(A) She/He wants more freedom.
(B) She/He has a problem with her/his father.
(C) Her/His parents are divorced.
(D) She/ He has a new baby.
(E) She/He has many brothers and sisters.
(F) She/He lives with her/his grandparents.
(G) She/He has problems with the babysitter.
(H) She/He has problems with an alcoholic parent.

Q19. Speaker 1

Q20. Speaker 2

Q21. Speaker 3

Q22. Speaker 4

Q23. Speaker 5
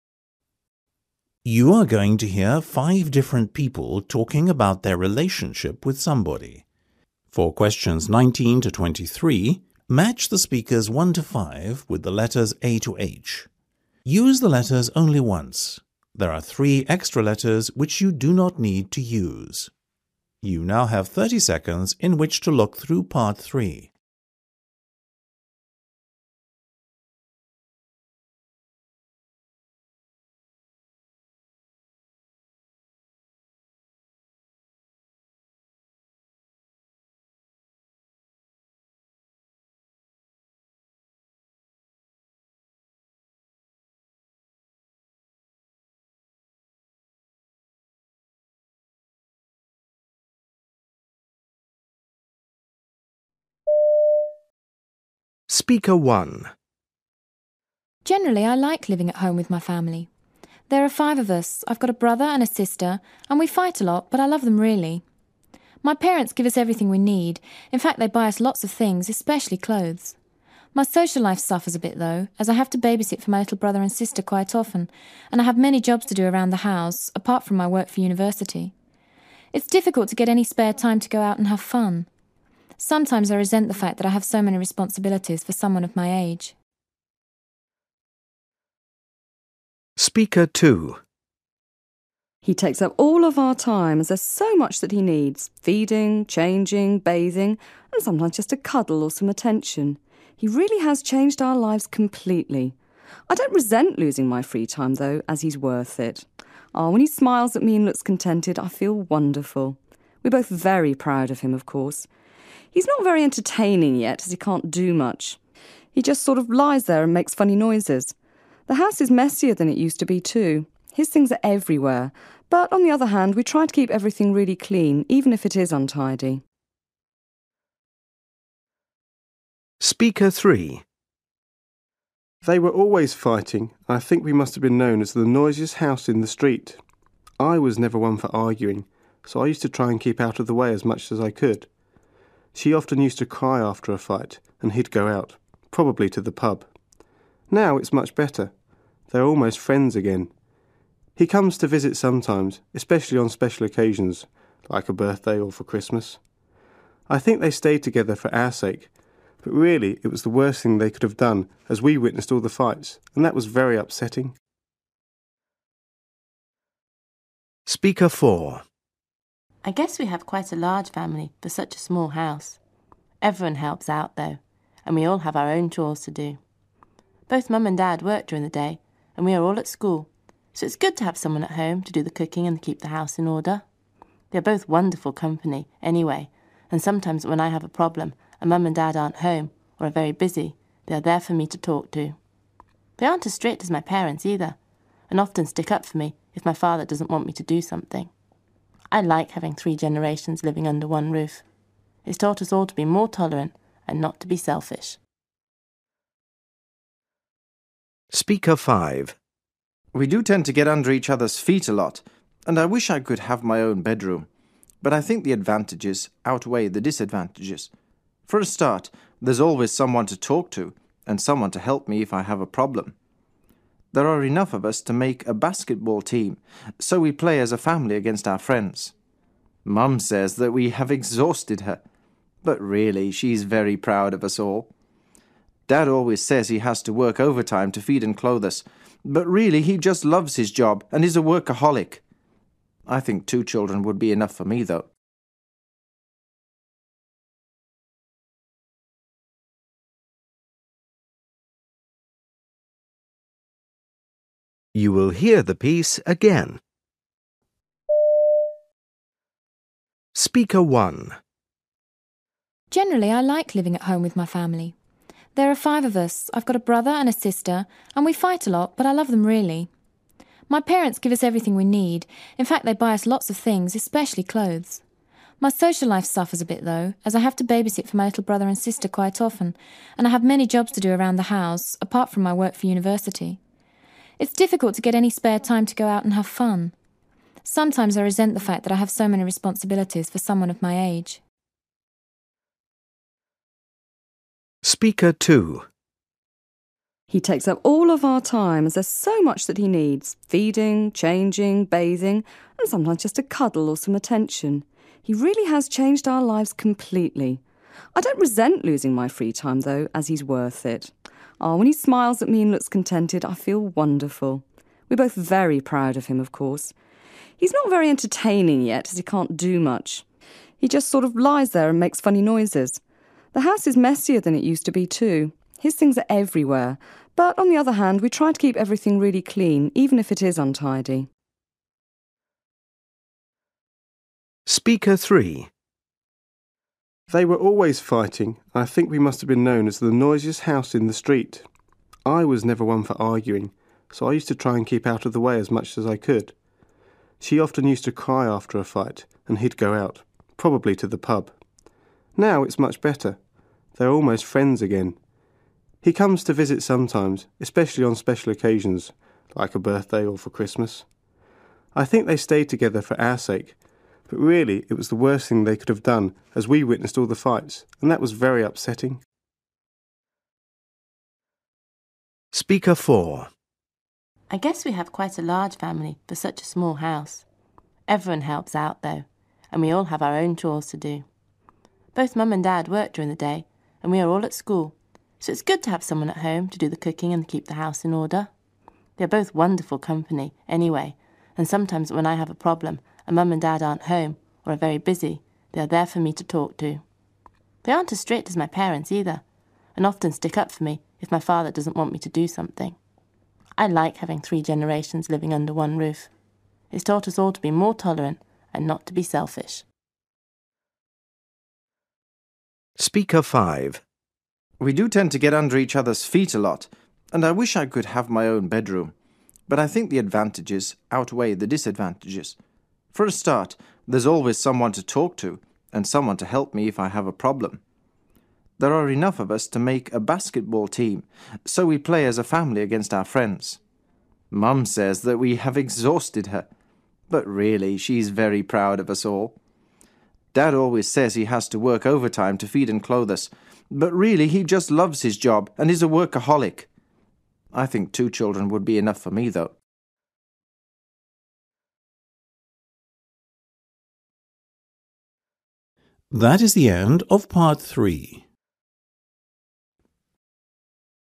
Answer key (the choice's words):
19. She/He wants more freedom.
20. She/ He has a new baby.
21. Her/His parents are divorced.
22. She/He lives with her/his grandparents.
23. She/He has many brothers and sisters.

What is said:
Generally I like living at home with my family. There are five of us. I've got a brother and a sister and we fight a lot but I love them really. My parents give us everything we need, in fact they buy us lots of things, especially clothes. My social life suffers a bit though as I have to babysit for my little brother and sister quite often and I have many jobs to do around the house apart from my work for university. It's difficult to get any spare time to go out and have fun. Sometimes I re sent the fact that I have so many responsibilities for someone of my age.
He takes up all of our time as there's so much that he needs; feeding, changing, bathing and sometimes just a cuddle or some attention. He really has changed our lives completely. I don't resent losing my free time though as he's worth it. When he smiles at me and looks con tented I feel wonderful. We're both very proud of him of course. He's not very entertaining yet as he can't do much. He just sort of lies there and makes funny noises. The house is messier than it used to be too. His things are everywhere but on the other hand we try to keep everything really clean even if it is untidy.
They were always fighting and I think we must have been known as the noisiest house in the street. I was never one for arguing so I used to try and keep out of the way as much as I could. She often used to cry after a fight and he'd go out, probably to the pub. Now it's much better. They are almost friends again. He comes to visit sometimes, especially on special occasions like a birthday or for Christmas. I think they stayed together for our sake but really it was the worst thing they could have done as we witnessed all the fights and that was very upsetting.
I guess we have quite a large family for such a small house. Everyone helps out though and we all have our own chores to do. Both mum and dad work during the day and we are all at school so it's good to have someone at home to do the cooking and keep the house in order. They are both wonderful company anyway and sometimes when I have a problem and mum and dad aren't home or are very busy, they are there for me to talk to. They aren't as strict as my parents either and often stick up for me if my father doesn't want me to do something. I like having three generations living under one roof. It's taught us all to be more tolerant and not to be selfish.
We do tend to get under each other's feet a lot and I wish I could have my own bedroom, but I think the advantages outweigh the disadvantages. For a start, there's always someone to talk to and someone to help me if I have a problem. There are enough of us to make a basketball team so we play as a family against our friends. Mum says that we have exhausted her but really she's very proud of us all. Dad always says he has to work overtime to feed and clothe us but really he just loves his job and is a workaholic. I think two children would be enough for me though.

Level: B2